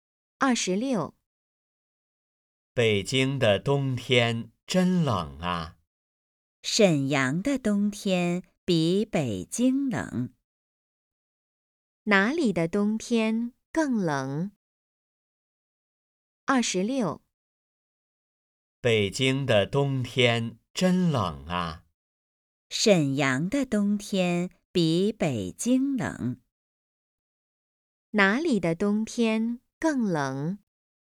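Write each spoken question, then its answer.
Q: 哪里的冬天更冷?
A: 沈阳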